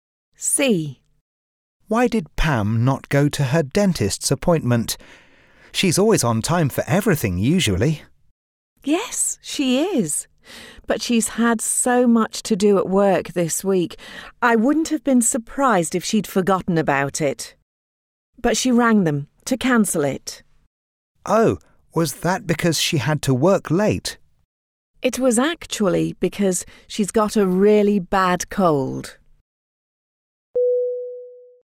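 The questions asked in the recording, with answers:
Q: Why did Pam not go to her dentist's appointment?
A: She has a really bad cold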